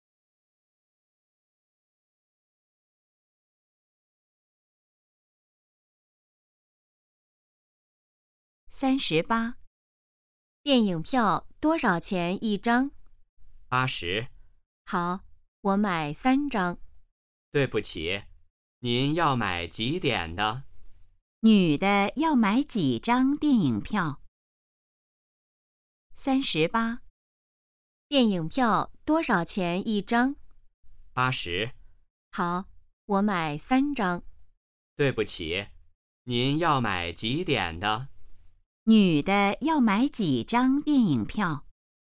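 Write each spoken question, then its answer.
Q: 女的要买几张电影票?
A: 三张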